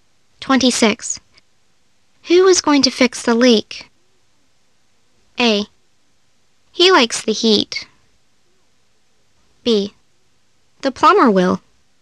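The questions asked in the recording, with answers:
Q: Who is going to fix the leak?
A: B: The plumber will.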